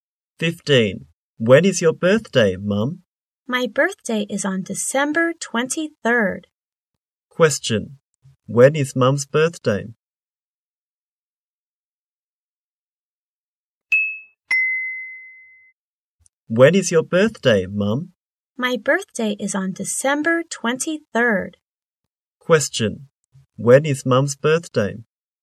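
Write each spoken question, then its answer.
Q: When is Mum's birthday?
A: December 23rd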